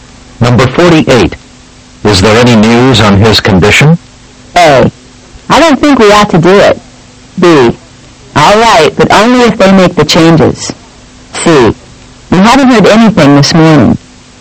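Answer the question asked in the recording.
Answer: C: We haven't heard anything this morning.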